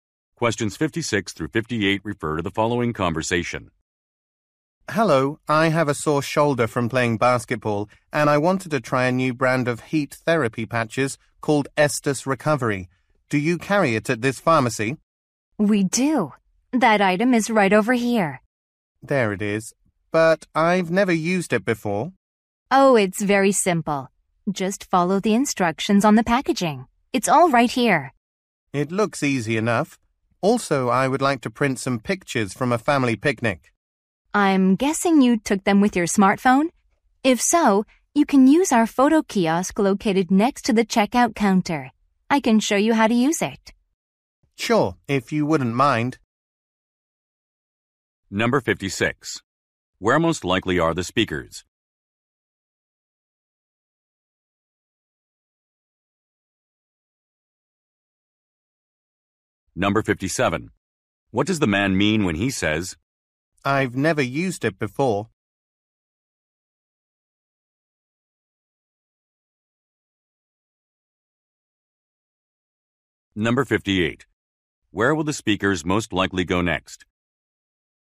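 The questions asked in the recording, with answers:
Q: Where most likely are the speakers?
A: At a pharmacy

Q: Where will the speakers most likely go next?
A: To the photo kiosk next to the checkout counter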